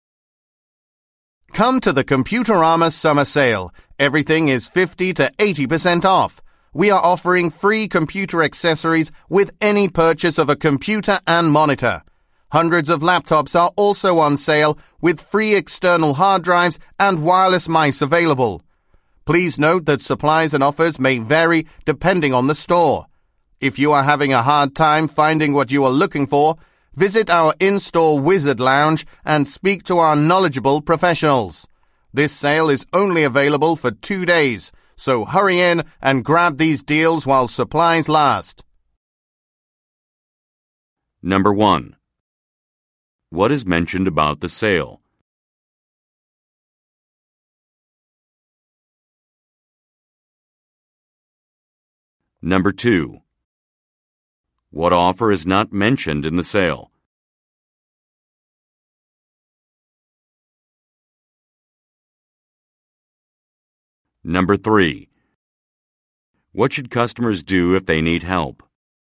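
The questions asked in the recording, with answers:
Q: What should customers do if they need help?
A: Visit the in-store Wizard Lounge and speak to professionals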